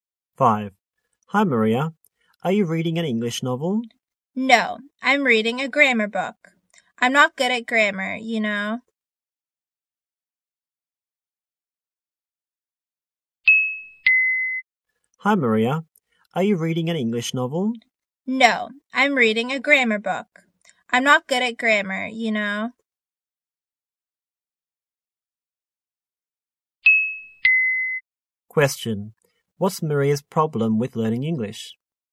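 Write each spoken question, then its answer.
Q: What's Maria's problem with learning English?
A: She's not good at grammar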